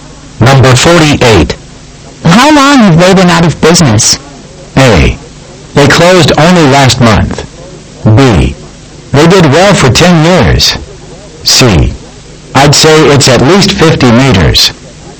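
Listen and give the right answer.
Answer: A: They closed only last month.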